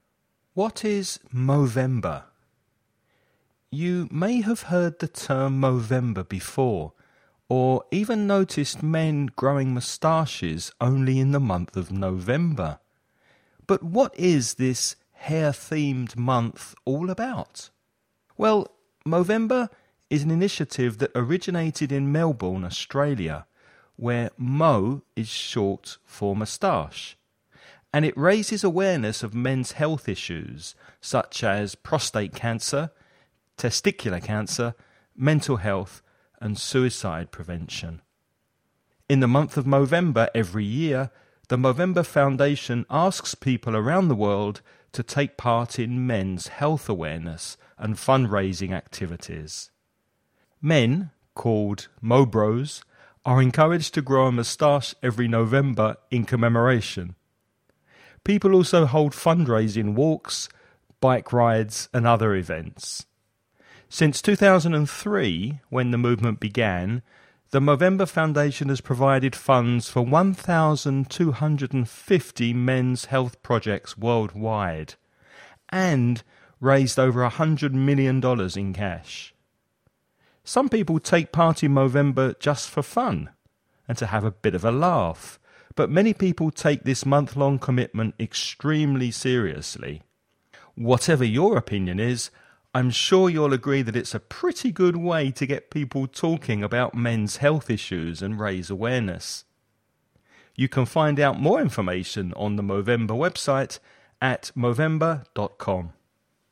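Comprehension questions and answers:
Listen and write the questions you hear.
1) Where did Movember first start?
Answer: Melbourne, Australia

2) What are the men who participate in Movember called?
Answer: Mobros

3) In which year did Movember start?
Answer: 2003

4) How much money has Movember raised so far?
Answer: over $100 million

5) Where can you find out more about Movember?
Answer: on the Movember website, movember.com

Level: nivel intermedio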